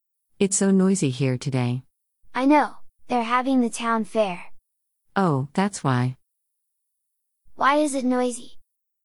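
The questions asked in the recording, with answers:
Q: Why is it noisy?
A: The town fair is on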